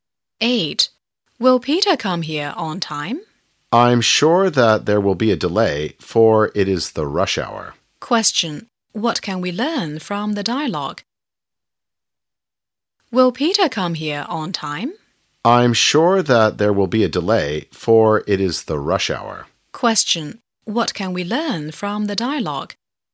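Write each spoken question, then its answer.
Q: What can we learn from the dialogue?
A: Peter will be late because it is rush hour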